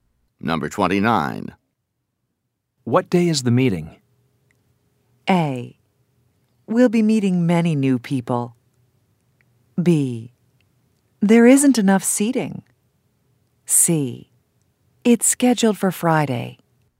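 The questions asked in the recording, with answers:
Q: What day is the meeting?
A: C: It's scheduled for Friday.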